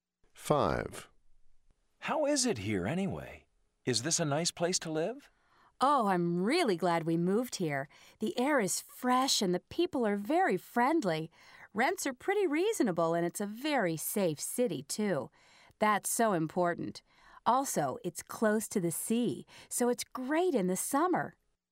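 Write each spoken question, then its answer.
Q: How is it here anyway? Is this a nice place to live?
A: Yes, likes it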